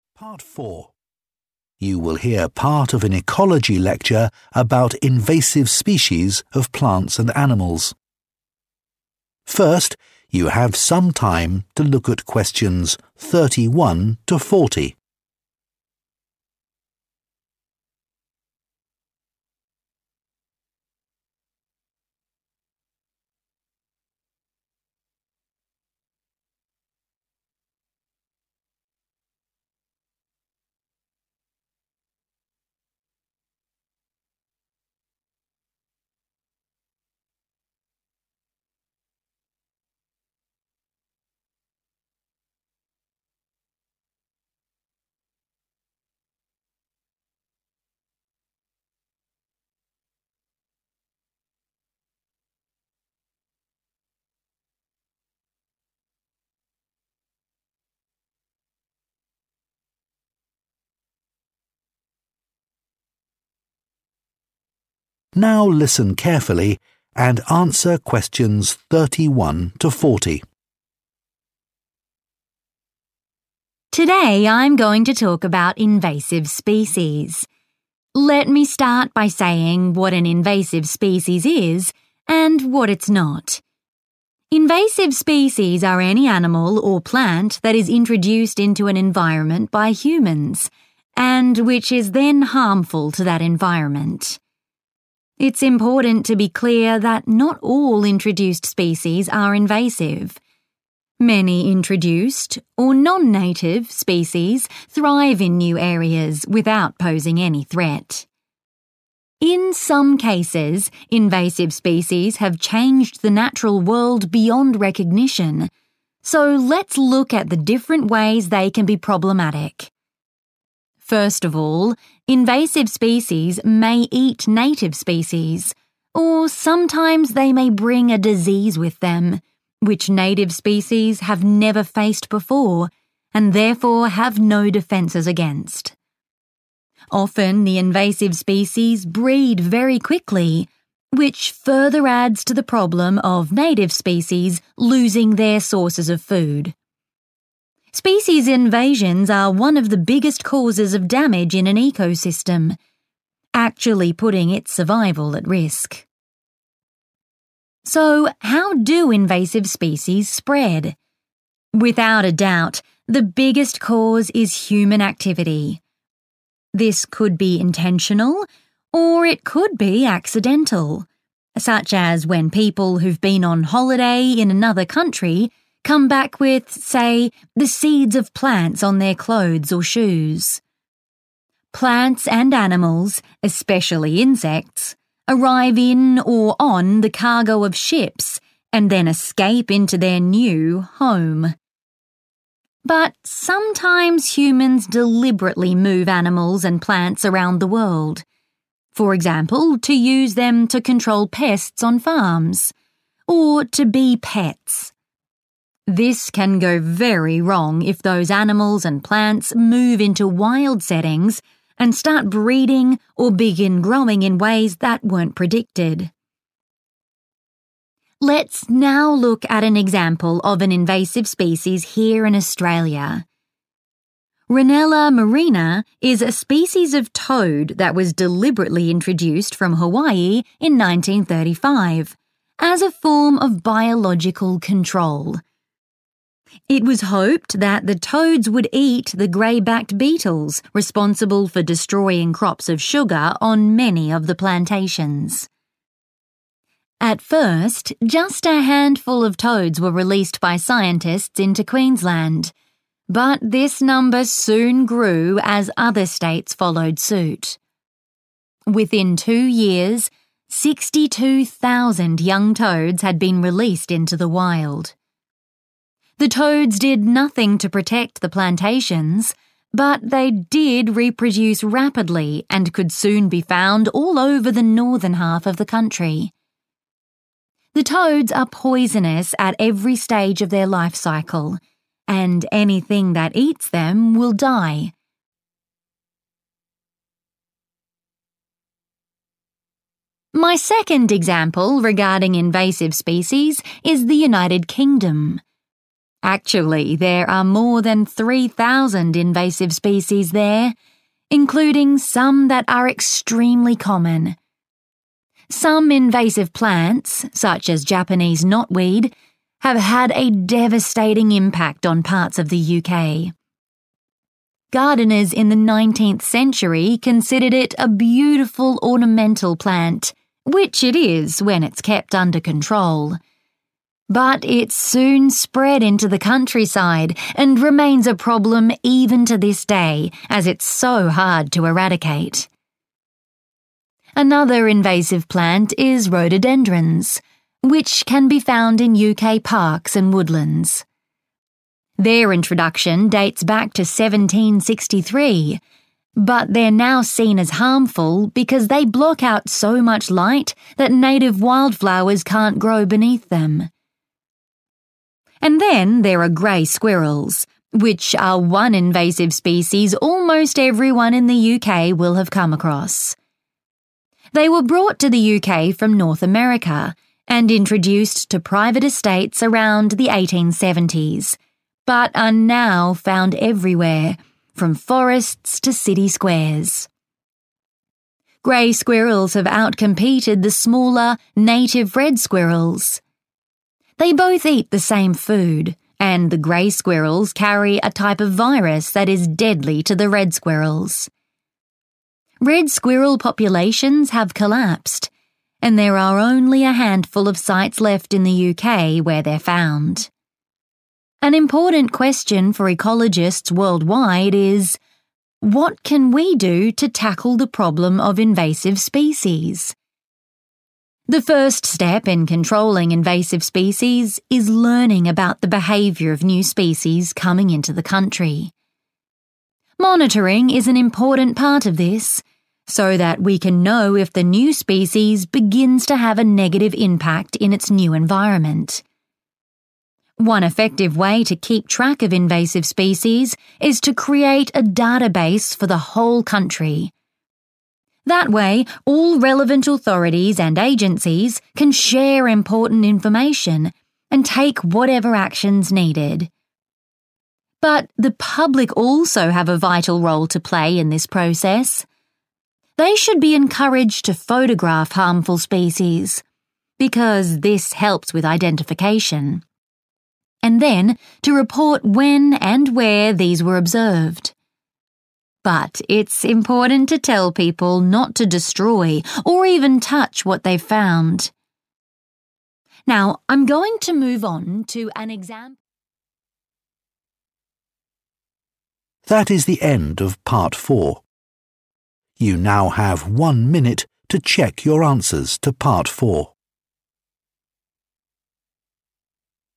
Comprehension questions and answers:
Complete the notes below. Write ONE WORD ONLY for each answer.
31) introduces a new 31 ........................................ .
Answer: disease

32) threatens an entire 32 ........................................ .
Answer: ecosystem

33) accidentally e.g. via people returning from their 33 ........................................ or on cargo ships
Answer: holiday

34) intentionally e.g. for pest control, or as 34 ........................................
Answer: pets

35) were introduced to Australia from Hawaii in 1935 to eat a type of insect that was damaging the 35 ........................................ plantations.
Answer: sugar

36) Rhododendron plants prevent 36 ........................................ from reaching native plants.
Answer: light

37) Grey squirrels from N. America reduce sources of food for the UK's native red squirrels and spread a 37 ........................................ that kills red squirrels.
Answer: virus

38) Monitoring helps us to understand the 38 ........................................ of invasive species and the impact they have.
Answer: behaviour/behavior

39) Setting up a national 39 ........................................ makes it easier to track them.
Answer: database

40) Asking the public to 40 ........................................ and report them helps with monitoring.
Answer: photograph

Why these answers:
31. Trước hết, các loài xâm lấn có thể ăn thịt các loài bản địa, hoặc đôi khi chúng có thể mang theo một loại bệnh mà loài bản địa ở đó chưa bao giờ mắc phải nên không có cơ chế phòng bị.
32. Loài xâm lấn là 1 trong những nguyên nhân lớn nhất gây tổn hại đến hệ sinh thái, thật sự đẩy cả sự sinh tồn của nó vào nguy hiểm.
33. Loài xâm lấn lan rộng có thể do cố ý (intentional) hoặc cả vô ý (accidental), ví dụ như khi người ta đi du lịch về và họ vô tình bị dính 1 loại hạt giống nào đó trên quần áo hoặc giày chẳng hạn. Hay các loài thực vật, động vật cũng như côn trùng cũng có thể đến được [một nơi khác] trong những thùng hàng trên tàu thuyền chở chúng, và sau đó trốn thoát vào "nhà" mới.
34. Nhưng đôi khi con người cố ý di chuyển động vật và thực vật đi khắp thế giới, VD như để kiểm soát sâu bệnh trong các trang trại, hoặc để làm thú cưng.
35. Người ta hy vọng là những con cóc sẽ ăn hết loài bọ lưng xám đã phá hoại nhiều đồn điền trồng đường.
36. Một loài xâm lấn khác có tên là rhododendrons có thể tìm thấy ở các công viên và rừng cây ở UK. Chúng lần đầu xuất hiện vào năm 1763, nhưng giờ đây được xem như là một loài độc hại vì chúng đã che quá nhiều ánh sáng nên các loài hoa dại bản địa nằm dưới chúng không mọc được.
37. Loài sóc xám đến từ Bắc Mỹ đã cạnh tranh vượt trội hơn (outcompeted) với loài sóc đỏ bản địa và giành thức ăn của chúng cũng như mang 1 loại virus làm chết loài sóc đỏ.
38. Bước đầu tiên trong việc kiểm soát các loài xâm lấn là tìm hiểu về tập tính của các loài mới xâm nhập vào đất nước.
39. Một cách hiệu quả để theo dõi các loài xâm lấn là tạo ra một cơ sở dữ liệu cho cả nước.
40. Công chúng đóng vai trò rất quan trọng trong quá trình này. Nên khuyến khích họ chụp hình lại những loài gây hại, vì điều này giúp nhận diện được chúng – và...

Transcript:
Lecturer: Today, I'm going to talk about invasive species. Let me start by saying what an invasive species is, and what it's not. Invasive species are any animal or plant that is introduced into an environment by humans, and which is then harmful to that environment.
It's important to be clear that not all introduced species are invasive. Many introduced, or non-native, species thrive in new areas without posing any threat. In some cases, invasive species have changed the natural world beyond recognition. So, let's look at the different ways they can be problematic.
First of all, invasive species may eat native species. Or sometimes they may bring a disease with them, which native species have never faced before and therefore have no defenses against. Often, the invasive species breed very quickly, which further adds to the problem of native species losing their sources of food. Species invasions are one of the biggest causes of damage in an ecosystem, actually putting its survival at risk.
So, how do invasive species spread? Without a doubt, the biggest cause is human activity. This could be intentional, or it could be accidental—such as when people who've been on holiday in another country come back with, say, the seeds of plants on their clothes or shoes. Plants and animals, especially insects, arrive in or on the cargo of ships, and then escape into their new home.
But sometimes humans deliberately move animals and plants around the world. For example, to use them to control pests on farms, or to be pets. This can go very wrong if those animals and plants move into wild settings and start breeding or begin growing in ways that weren't predicted.
Let's now look at an example of an invasive species here in Australia. Rhinella marina is a species of toad that was deliberately introduced from Hawaii in 1935 as a form of biological control. It was hoped that the toads would eat the grey-backed beetles responsible for destroying crops of sugar on many of the plantations. At first, just a handful of toads were released by scientists into Queensland. But this number soon grew as other states followed suit. Within two years, 62,000 young toads had been released into the wild. The toads did nothing to protect the plantations, but they did reproduce rapidly and could soon be found all over the northern half of the country. The toads are poisonous at every stage of their life cycle, and anything that eats them will die.
My second example regarding invasive species is the United Kingdom. Actually, there are more than 3,000 invasive species there, including some that are extremely common. Some invasive plants, such as Japanese knotweed, have had a devastating impact on parts of the UK. Gardeners in the 19th century considered it a beautiful ornamental plant—which it is, when it's kept under control. But it soon spread into the countryside and remains a problem even to this day, as it's so hard to eradicate.
Another invasive plant is rhododendrons, which can be found in UK parks and woodlands. Their introduction dates back to 1763, but they're now seen as harmful because they block out so much light that native wildflowers can't grow beneath them.
And then, there are grey squirrels, which are one invasive species almost everyone in the UK will have come across. They were brought to the UK from North America and introduced to private estates around the 1870s, but are now found everywhere, from forests to city squares. Grey squirrels have outcompeted the smaller, native red squirrels. They both eat the same food, and the grey squirrels carry a type of virus that is deadly to the red squirrels. Red squirrel populations have collapsed, and there are only a handful of sites left in the UK where they're found.
An important question for ecologists worldwide is: What can we do to tackle the problem of invasive species?
The first step in controlling invasive species is learning about the behavior of new species coming into the country. Monitoring is an important part of this, so that we can know if the new species begins to have a negative impact in its new environment. One effective way to keep track of invasive species is to create a database for the whole country. That way, all relevant authorities and agencies can share important information and take whatever action is needed.
But the public also have a vital role to play in this process. They should be encouraged to photograph harmful species, because this helps with identification, and then to report when and where these were observed. But it's important to tell people not to destroy, or even touch, what they've found.
Now, I'm going to move on to an example...